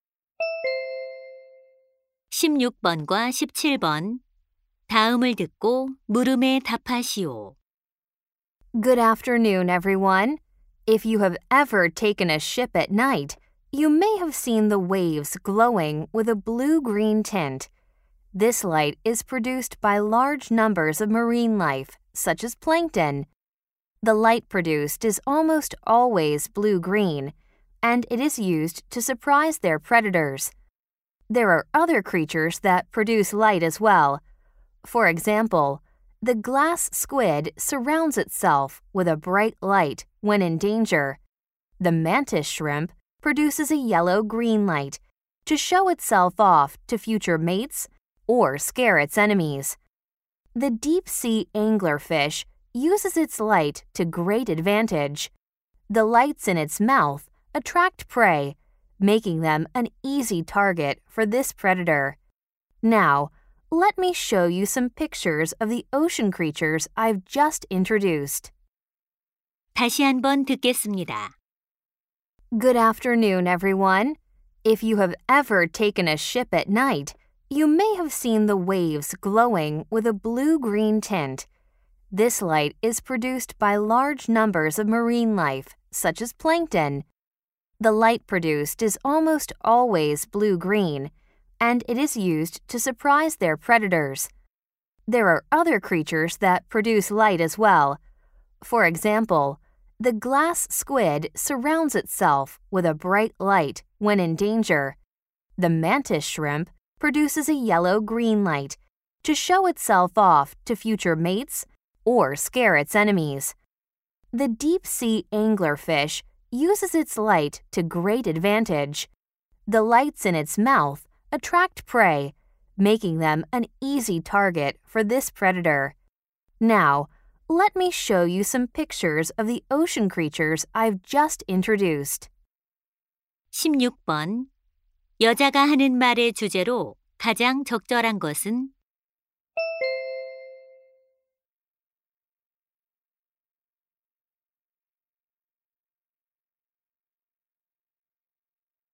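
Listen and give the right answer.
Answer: 바다 생물이 빛을 내는 목적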